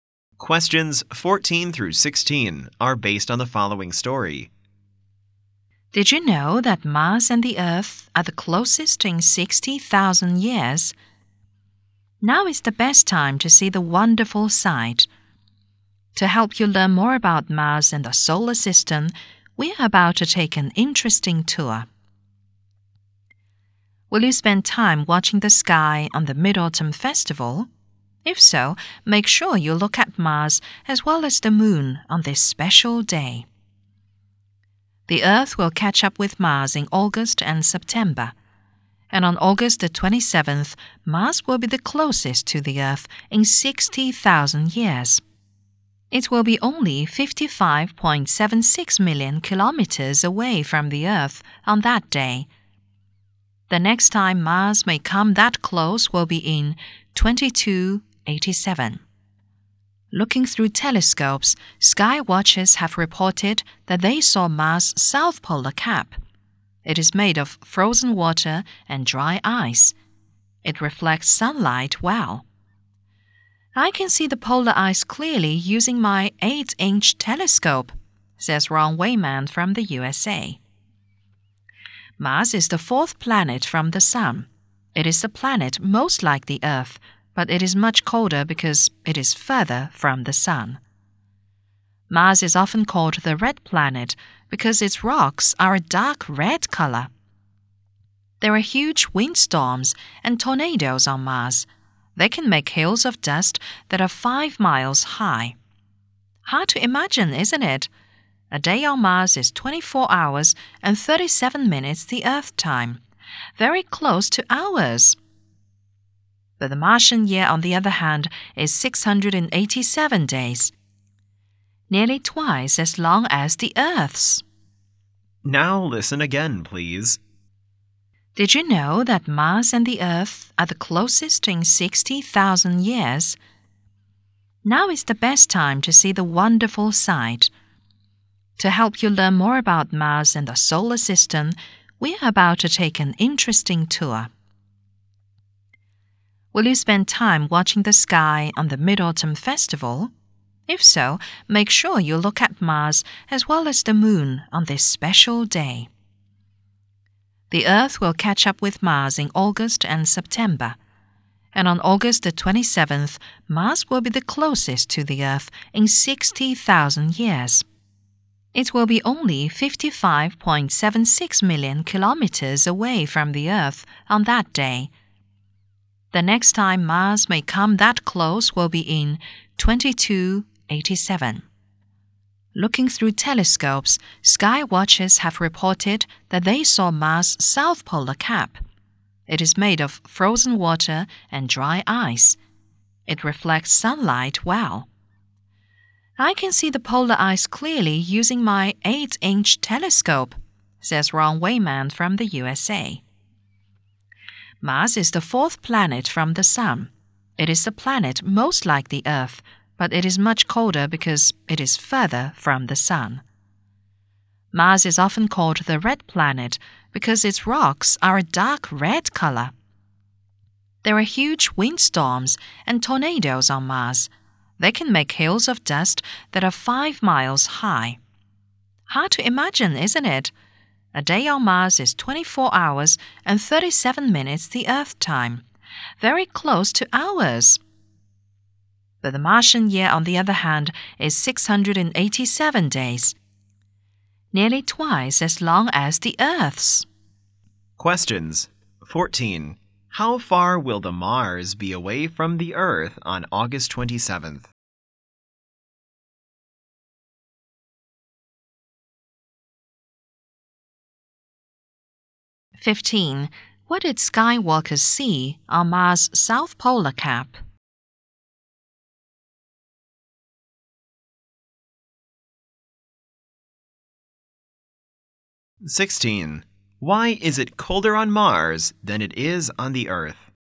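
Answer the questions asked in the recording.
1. 55.76 million kilometers
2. Frozen water and dry ice
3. It is further from the Sun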